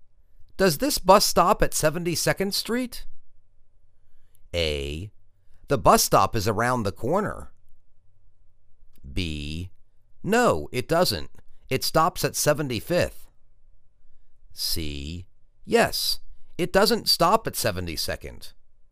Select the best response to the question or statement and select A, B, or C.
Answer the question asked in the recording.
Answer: No, it doesn't. It stops at 75th.